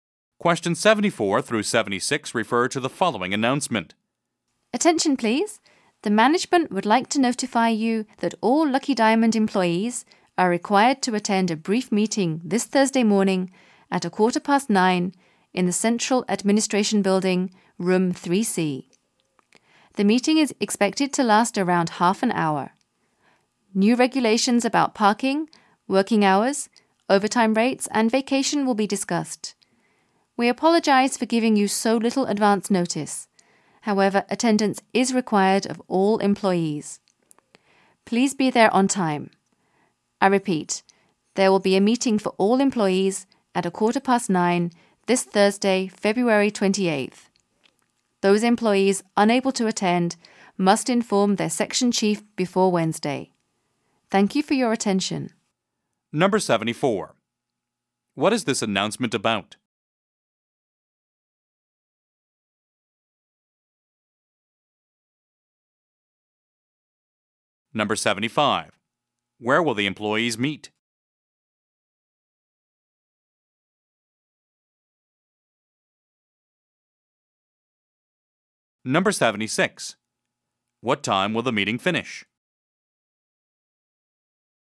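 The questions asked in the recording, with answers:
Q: What is this announcement about?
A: A required meeting for all employees

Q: Where will the employees meet?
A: In the Central Administration Building, Room 3C

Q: What time will the meeting finish?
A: Around 9:45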